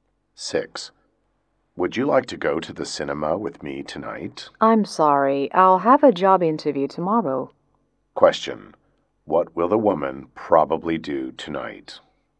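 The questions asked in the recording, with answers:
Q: What will the woman probably do tonight?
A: Prepare for her job interview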